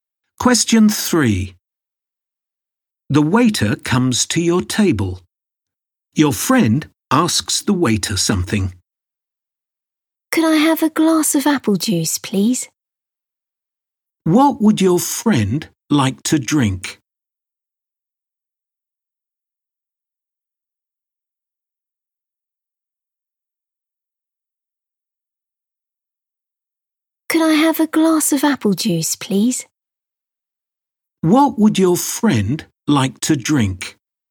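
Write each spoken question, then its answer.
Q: What would your friend like to drink?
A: A glass of apple juice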